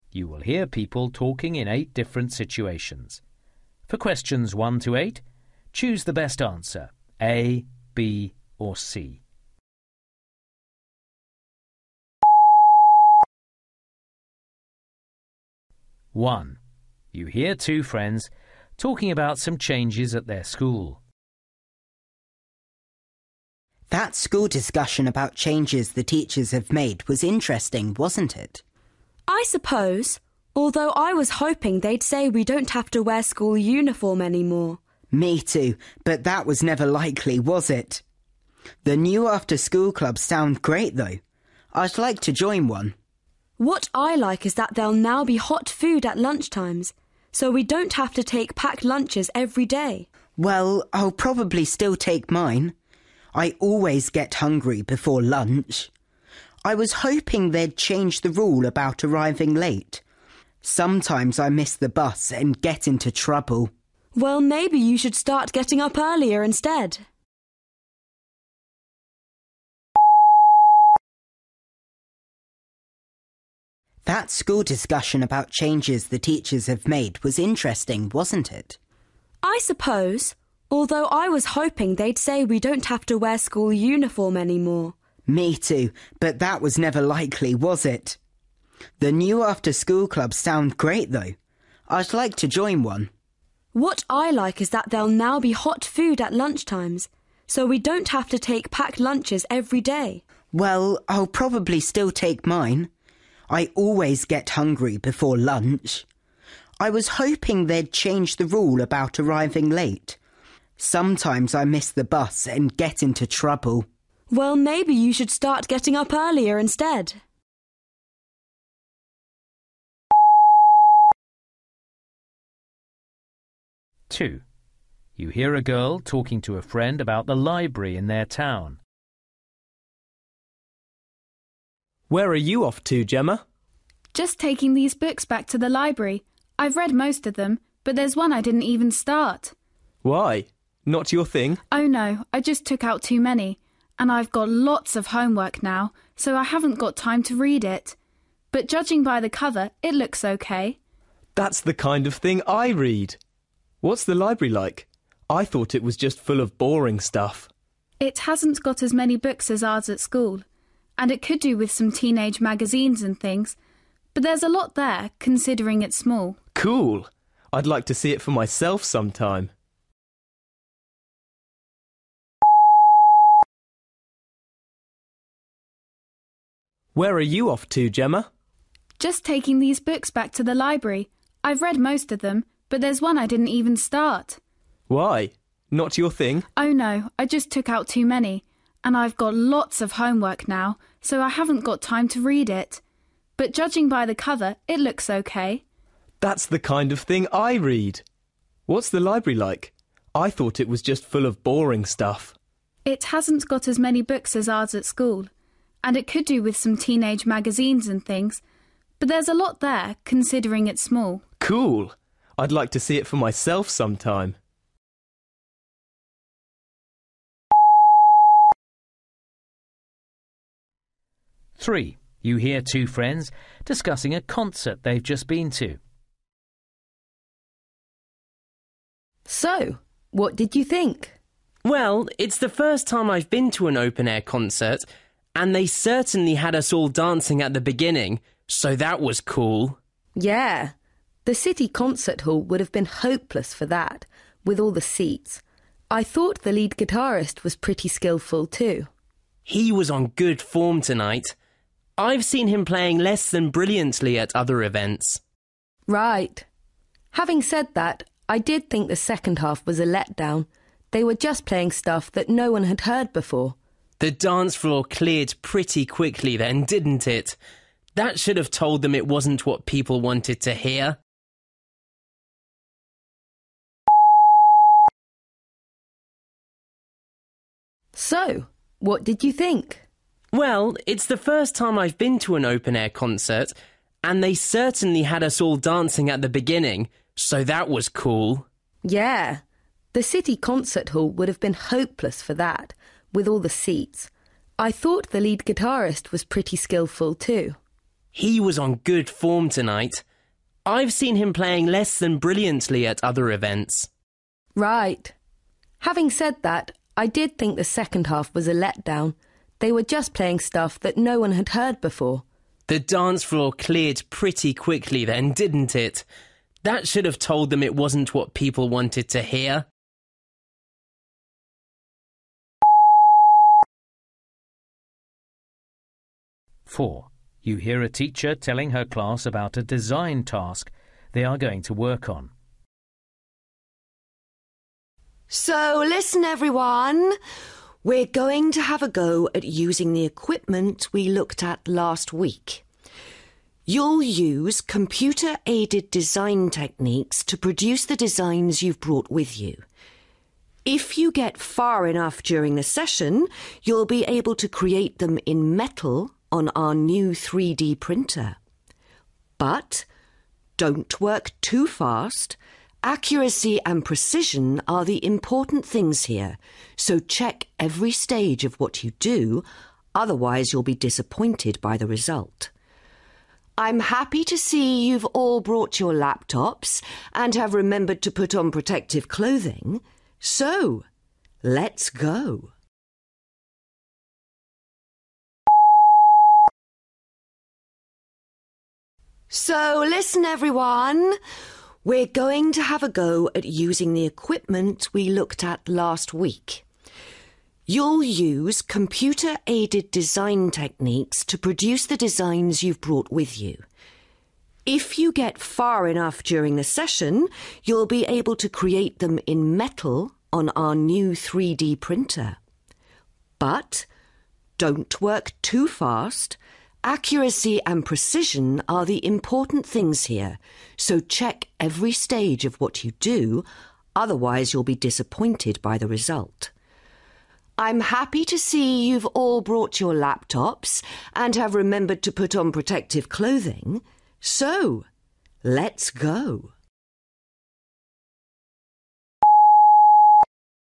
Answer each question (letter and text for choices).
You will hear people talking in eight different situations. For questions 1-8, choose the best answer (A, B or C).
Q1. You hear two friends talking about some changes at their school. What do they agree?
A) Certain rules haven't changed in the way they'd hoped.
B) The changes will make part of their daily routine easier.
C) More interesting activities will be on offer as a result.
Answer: A) Certain rules haven't changed in the way they'd hoped.

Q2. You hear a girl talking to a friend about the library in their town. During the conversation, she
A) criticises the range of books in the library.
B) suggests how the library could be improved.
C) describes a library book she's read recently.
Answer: B) suggests how the library could be improved.

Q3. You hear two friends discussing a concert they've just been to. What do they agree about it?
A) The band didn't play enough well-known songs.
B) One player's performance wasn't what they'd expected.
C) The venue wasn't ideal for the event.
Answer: A) The band didn't play enough well-known songs.

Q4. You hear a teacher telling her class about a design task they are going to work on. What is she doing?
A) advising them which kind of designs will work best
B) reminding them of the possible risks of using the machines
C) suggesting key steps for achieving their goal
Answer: C) suggesting key steps for achieving their goal

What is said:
1
Simon: That school discussion about changes the teachers have made was interesting, wasn't it?
Vikki: I suppose, although I was hoping they'd say we don't have to wear school uniform any more.
Simon: Me too, but that was never likely, was it? The new after-school clubs sound great, though. I'd like to join one.
Vikki: What I like is that there'll now be hot food at lunchtimes, so we don't have to take packed lunches every day.
Simon: Well, I'll probably still take mine – I always get hungry before lunch! I was hoping they'd change the rule about arriving late. Sometimes I miss the bus, and get into trouble ...
Vikki: Well, maybe you should start getting up earlier instead!
Frank: Where are you off to, Gemma?
Gemma: Just talking these books back to the library. I've read most of them, but there's one I didn't even start.
Frank: Why? Not your thing?
Gemma: Oh no, I just took out too many and I've got lots of homework now, so I haven't got time to read it. But judging by the cover, it looks OK.
Frank: That's the kind of thing I read! What's the library like? I thought it was just full of boring stuff.
Gemma: It hasn't got as many books as ours at school and it could do with some teenage magazines and things – but there's a lot there, considering it's small.
Frank: Cool! I'd like to see it for myself sometime!
Rosie: So, what did you think?
Oscar: Well, it's the first time I've been to an open-air concert, and they certainly had us all dancing at the beginning, so that was cool.
Rosie: Yeah, the city concert hall would've been hopeless for that, will all the seats. I thought the lead guitarist was pretty skilful too.
Oscar: He was on good form tonight – I've seen him playing less than brilliantly at other events.
Rosie: Right. Having said that, I did think the second half was a let-down – they were just playing stuff that no-one had heard before.
Oscar: The dance floor cleared pretty quickly then, didn't it? That should've told them it wasn't what people wanted to hear!
So listen everyone – we're going to have a go at using the equipment we looked at last week. You'll use computer-aided design techniques to produce the designs you've brought with you. If you get far enough during the session, you'll be able to create them in metal on our new 3D printer. But don't work too fast – accuracy and precision are the important things here, so check every stage of what you do, otherwise you'll be disappointed by the result. I'm happy to see you've all brought your laptops and have remembered to put on protective clothing, so – let's go!

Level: B2